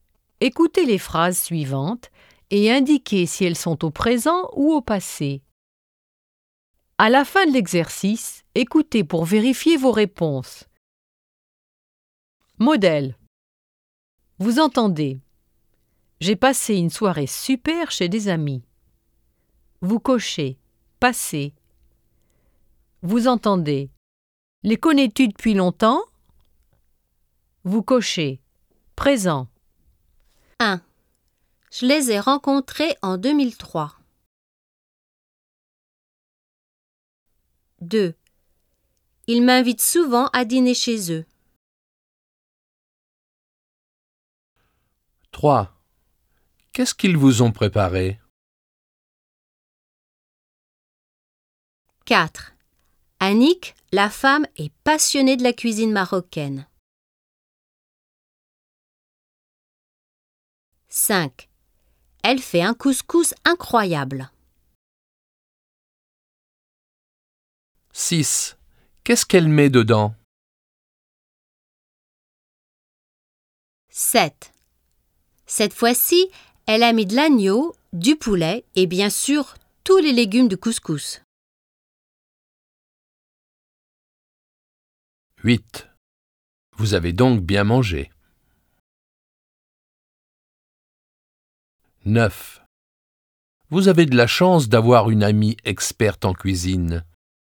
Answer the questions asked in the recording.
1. 1. Passé.
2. 2. Présent.
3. 3. Passé.
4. 4. Présent.
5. 5. Présent.
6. Présent.
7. 7. Passé.
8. 8. Passé.
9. 9. Présent.